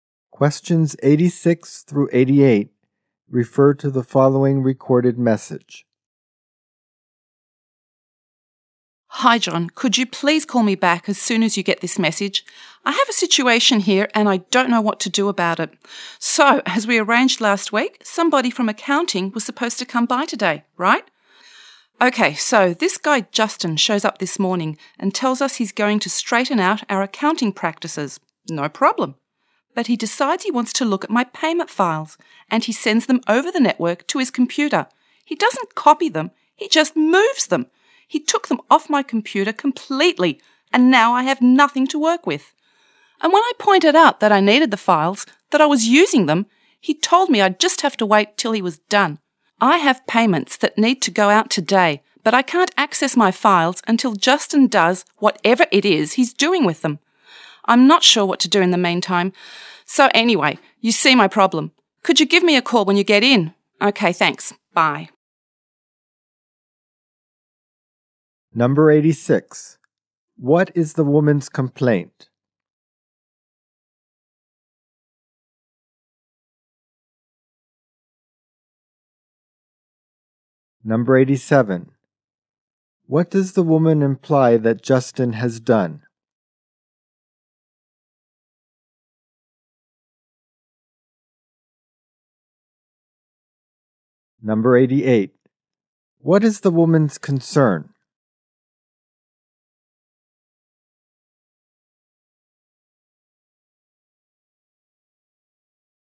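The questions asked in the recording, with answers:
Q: What is the woman's complaint?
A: Justin moved her payment files off her computer so she can't work

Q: What is the woman's concern?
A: She can't send out payments due today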